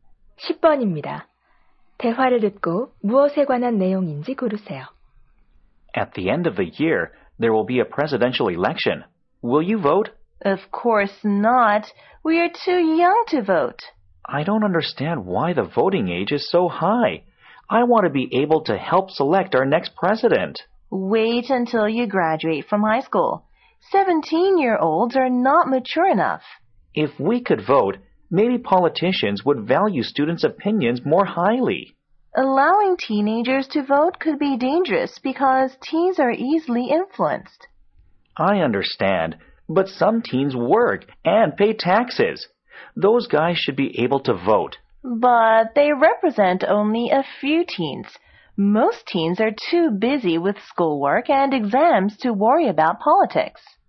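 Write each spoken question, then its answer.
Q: 대화를 듣고 무엇에 관한 내용인지 고르세요.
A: 청소년의 투표 연령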